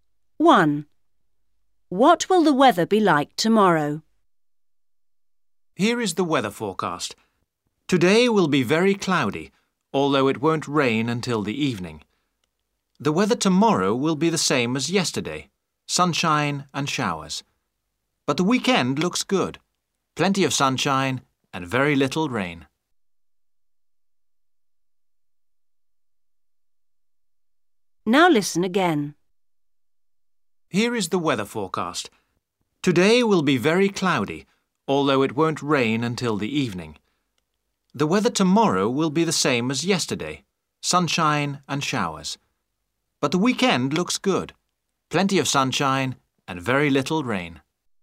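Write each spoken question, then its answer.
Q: What will the weather be like tomorrow?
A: sunshine and showers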